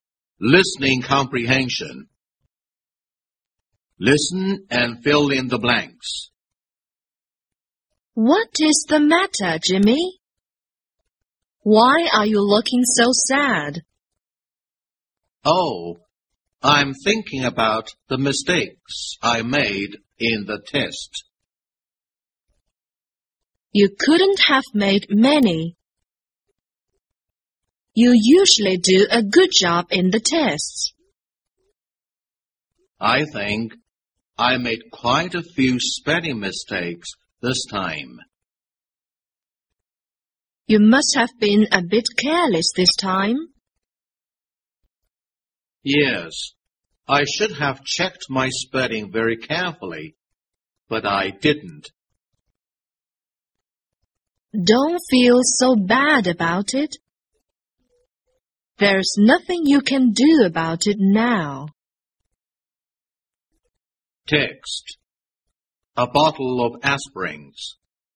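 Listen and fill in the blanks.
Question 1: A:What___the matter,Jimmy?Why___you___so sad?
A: is; are; looking

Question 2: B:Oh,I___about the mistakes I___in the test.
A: 'm thinking; made

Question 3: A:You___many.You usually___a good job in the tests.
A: couldn't have made; do

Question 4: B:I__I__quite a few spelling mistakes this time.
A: think; made

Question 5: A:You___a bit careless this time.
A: must have been

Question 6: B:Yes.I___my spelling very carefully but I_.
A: should have checked; didn't

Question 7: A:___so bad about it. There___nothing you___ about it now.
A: Don't feel; 's; can do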